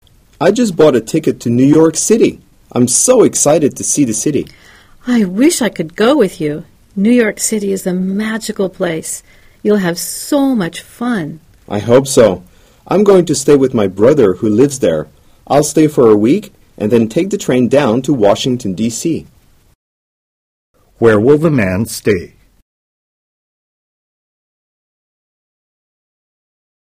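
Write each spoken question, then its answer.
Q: Where will the man stay?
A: With his brother in New York City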